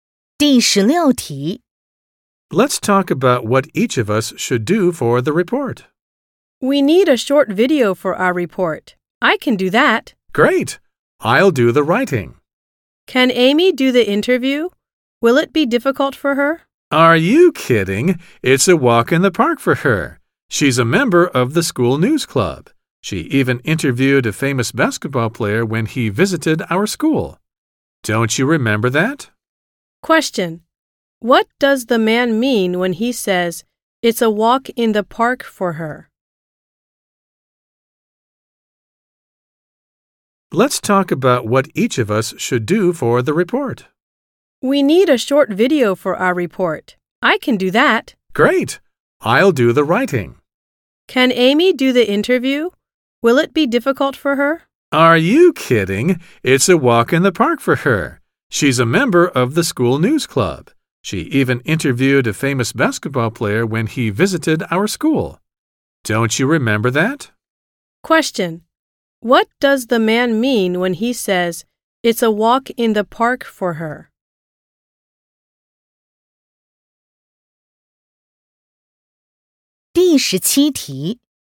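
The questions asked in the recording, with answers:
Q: What does the man mean when he says, it's a walk in the park for her?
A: The interview will be easy for Amy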